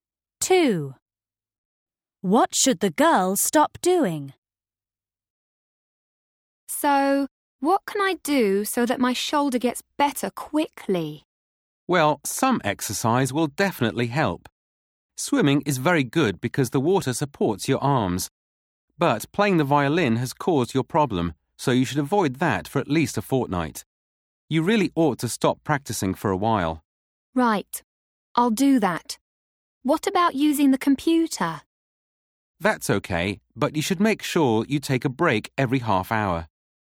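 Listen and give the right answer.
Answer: Playing the violin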